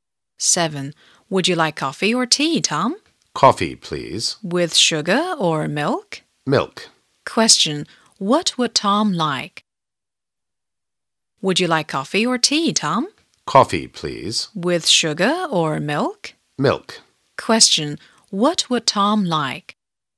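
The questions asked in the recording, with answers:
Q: what would Tom like?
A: Coffee with milk.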